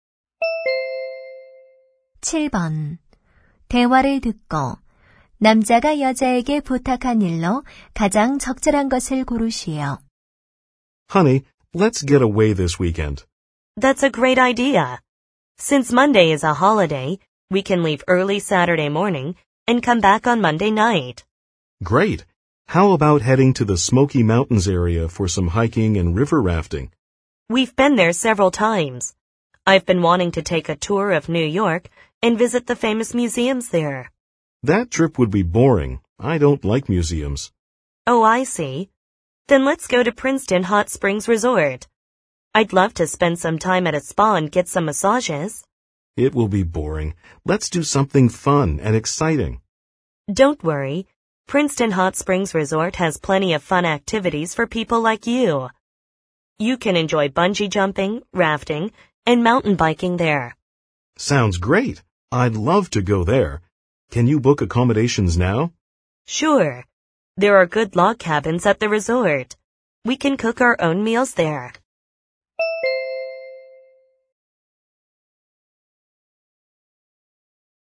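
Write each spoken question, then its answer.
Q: 대화를 듣고 남자가 여자에게 부탁한 일로 가장 적절한 것을 고르시오.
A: 숙소 예약하기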